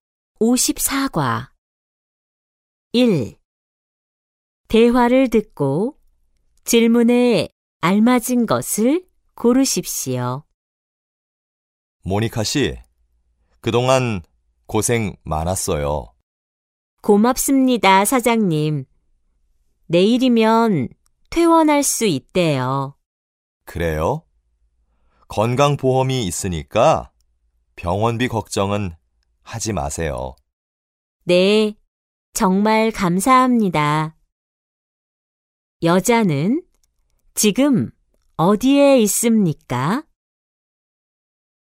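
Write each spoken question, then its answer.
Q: 여자는 지금 어디에 있습니까?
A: 병원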